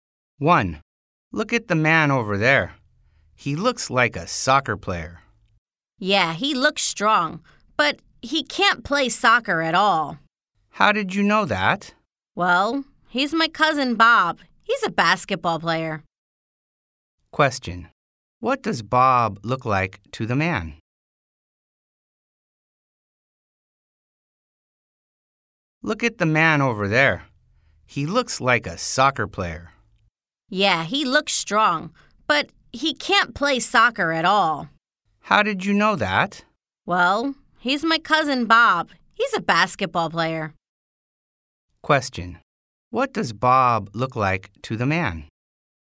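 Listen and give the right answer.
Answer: A soccer player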